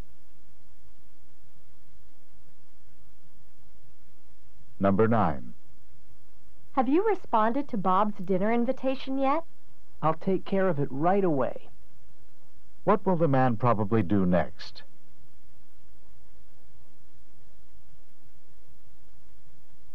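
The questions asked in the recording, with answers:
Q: What will the man probably do next?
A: Respond to Bob's dinner invitation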